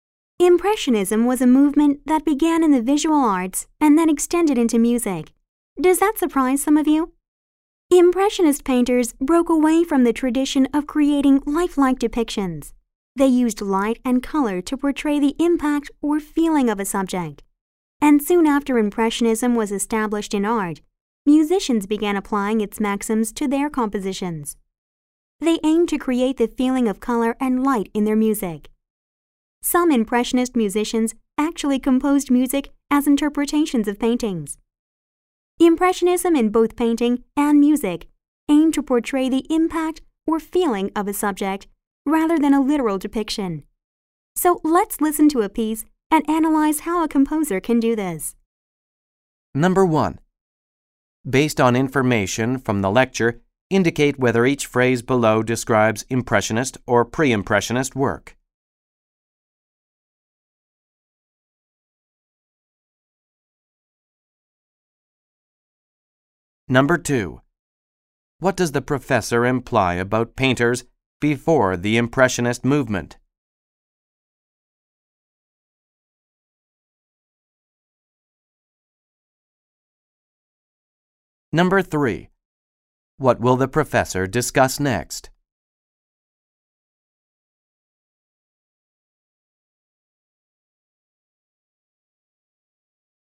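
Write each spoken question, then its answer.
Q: What does the professor imply about painters before the Impressionist movement?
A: They tried to make realistic, lifelike depictions.

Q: What will the professor discuss next?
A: A piece of music, and how its composer shows a subject's impact or feeling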